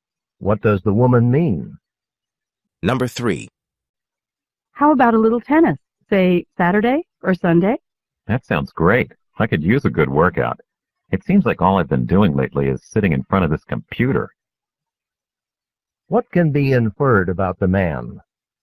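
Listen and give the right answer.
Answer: He hasn't had much exercise lately because he's been working at the computer.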